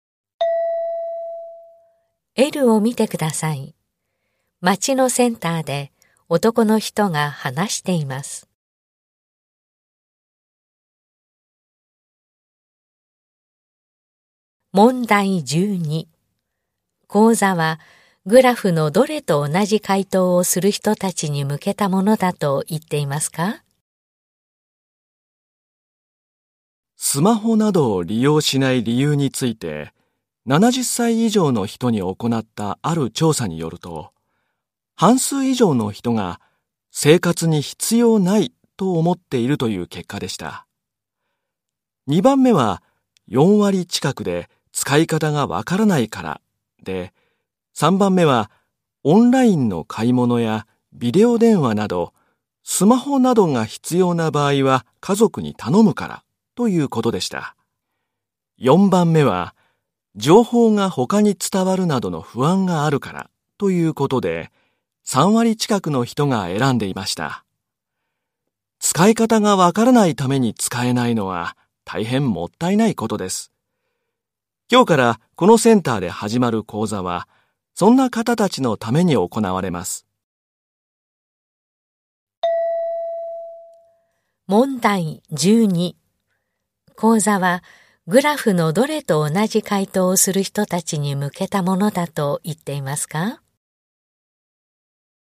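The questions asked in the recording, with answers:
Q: 講座はグラフのどれと同じ回答をする人たちに向けたものだと言っていますか?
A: 使い方がわからないから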